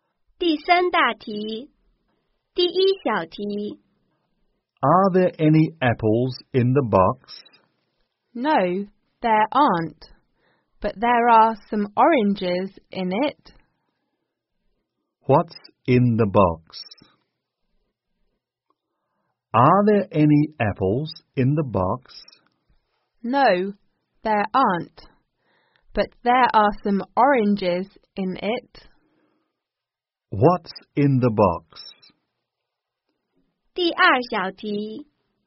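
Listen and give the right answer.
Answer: Some oranges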